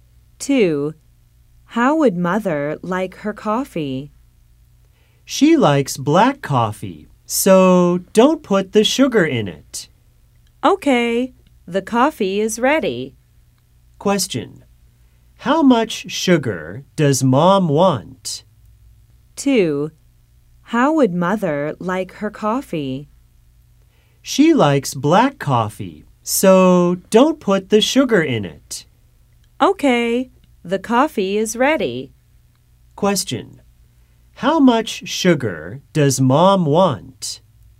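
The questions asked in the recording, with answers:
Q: Question, how much sugar does mom want?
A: None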